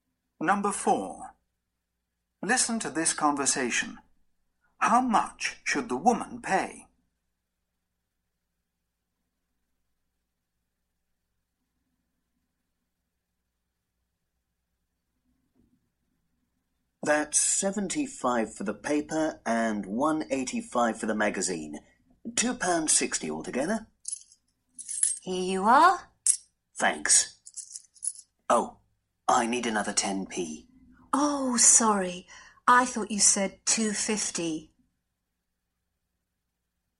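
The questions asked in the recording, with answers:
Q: How much should the woman pay?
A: £2.60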